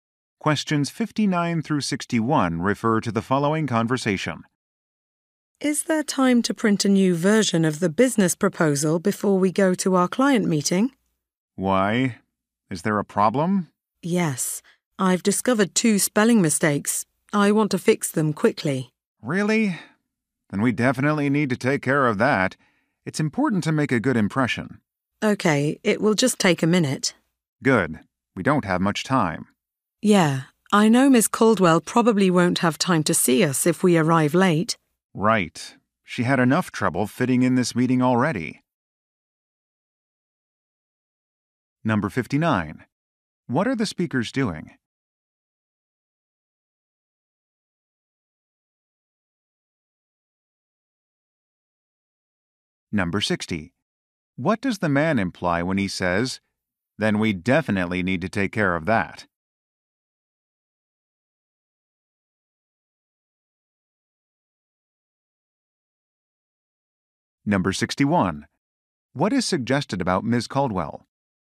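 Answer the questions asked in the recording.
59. Getting ready for a client meeting
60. The mistakes must be fixed before the meeting
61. She has a very busy schedule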